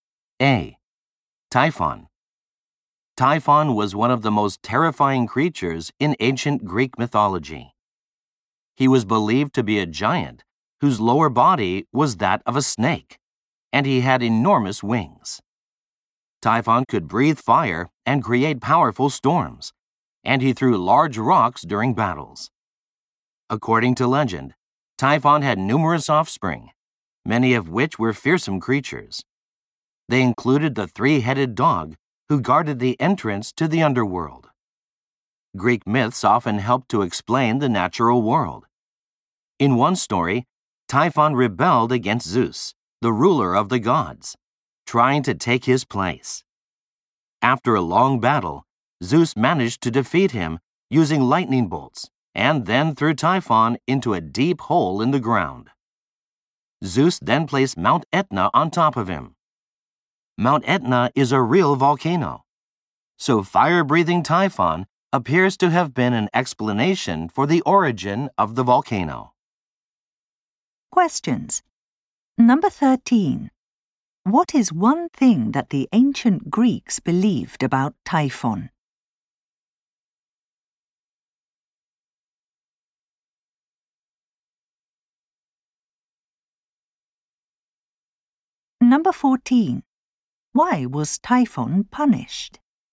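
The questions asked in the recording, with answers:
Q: What is one thing that the ancient Greeks believed about Typhon?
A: He was a giant with a snake's lower body and enormous wings who could breathe fire

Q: Why was Typhon punished?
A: He rebelled against Zeus and tried to take his place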